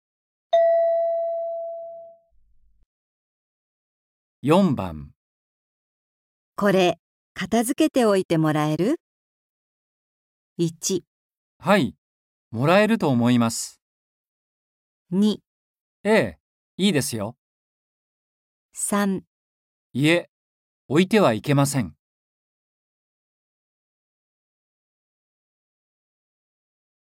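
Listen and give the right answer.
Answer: 2

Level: N4.36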